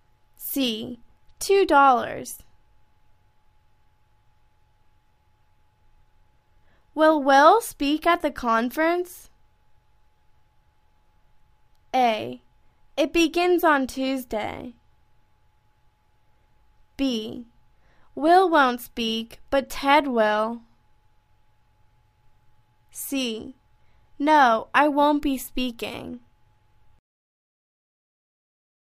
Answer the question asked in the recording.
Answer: Will won't speak, but Ted will.